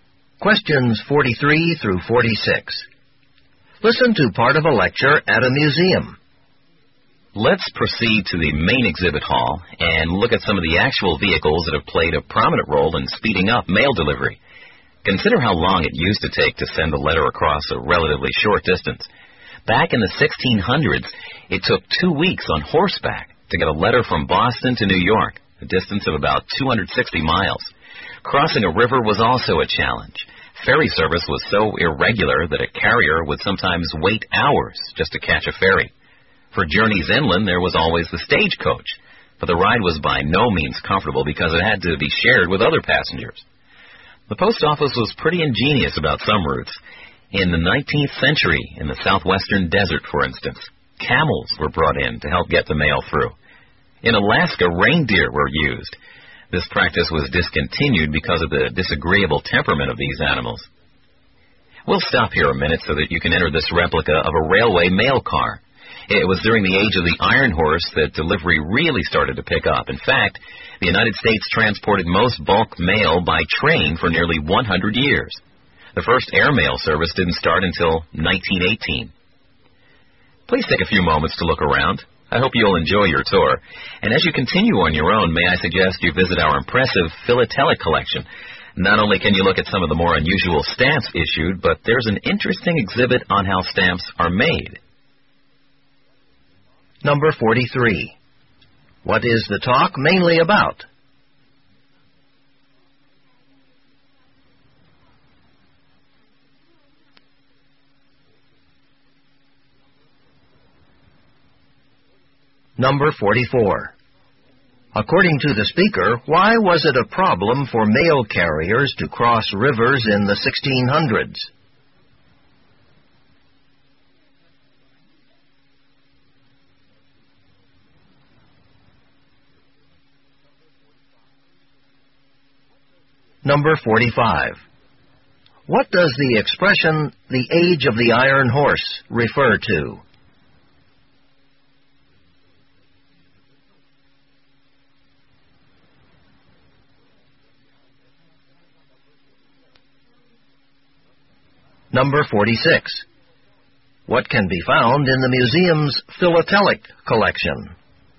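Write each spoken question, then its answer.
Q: What is the talk mainly about?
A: The history of mail delivery methods

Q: According to the speaker, why was it a problem for mail carriers to cross rivers in the 1600s?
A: Ferry service was irregular, so carriers sometimes waited hours

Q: What does the expression, the age of the iron horse, refer to?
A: The era of railroads/trains

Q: What can be found in the museum's philatelic collection?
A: Unusual stamps and an exhibit on how stamps are made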